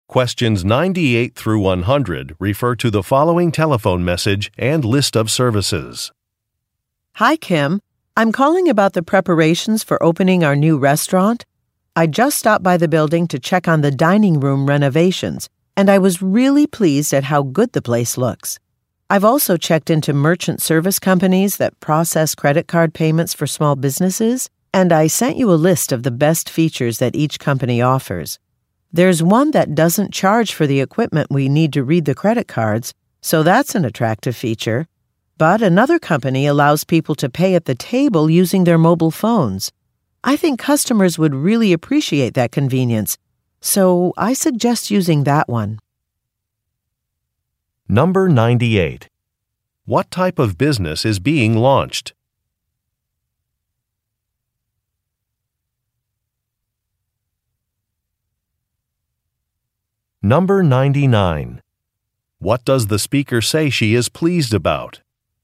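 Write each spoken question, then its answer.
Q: What type of business is being launched?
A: A restaurant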